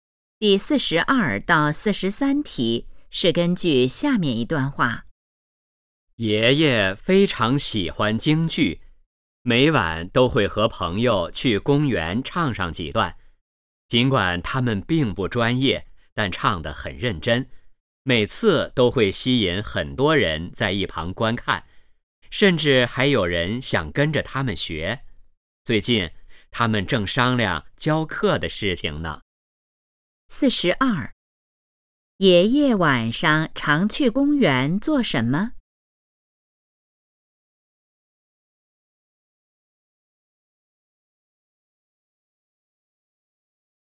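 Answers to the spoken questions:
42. 唱京剧
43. 教课的事情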